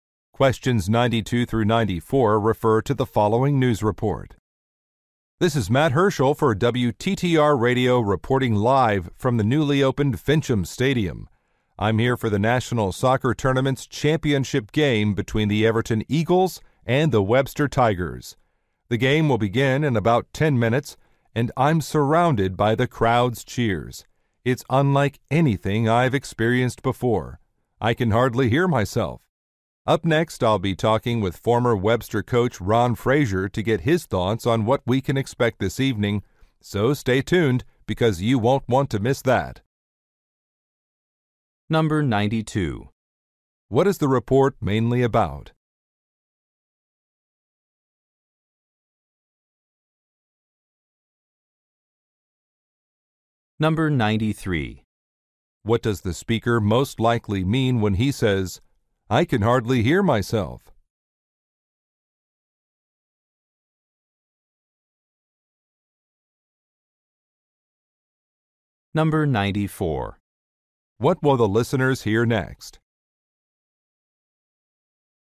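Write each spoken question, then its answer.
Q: What is the report mainly about?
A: A soccer championship game

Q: What does the speaker most likely mean when he says, "I can hardly hear myself"?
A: The crowd is very loud

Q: What will the listeners hear next?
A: An interview with a former coach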